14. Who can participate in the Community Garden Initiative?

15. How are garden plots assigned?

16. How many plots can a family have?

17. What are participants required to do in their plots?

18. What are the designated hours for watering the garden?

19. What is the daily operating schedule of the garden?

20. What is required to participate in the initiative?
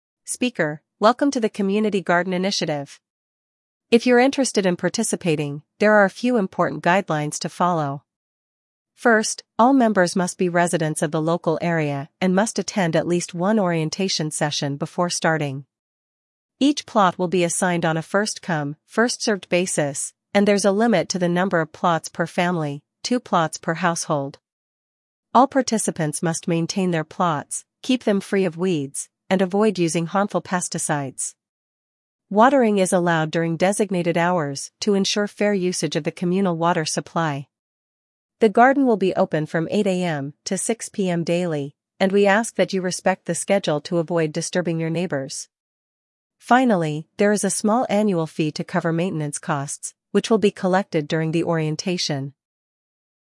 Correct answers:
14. Residents of the local area.
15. On a first-come, first-served basis.
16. Two plots per family.
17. Keep plots free of weeds and avoid harmful pesticides.
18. During designated hours.
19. 8:00 AM to 6:00 PM.
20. Attend an orientation session.

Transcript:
Speaker: Welcome to the Community Garden Initiative! If you're interested in participating, there are a few important guidelines to follow. First, all members must be residents of the local area and must attend at least one orientation session before starting.
Each plot will be assigned on a first-come, first-served basis, and there's a limit to the number of plots per family—two plots per household. All participants must maintain their plots, keep them free of weeds, and avoid using harmful pesticides. Watering is allowed during designated hours to ensure fair usage of the communal water supply.
The garden will be open from 8:00 AM to 6:00 PM daily, and we ask that you respect the schedule to avoid disturbing your neighbors. Finally, there is a small annual fee to cover maintenance costs, which will be collected during the orientation.